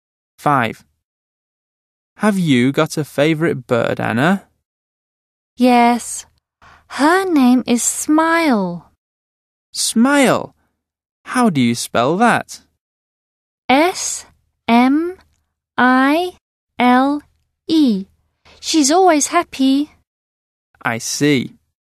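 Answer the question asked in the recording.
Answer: Smile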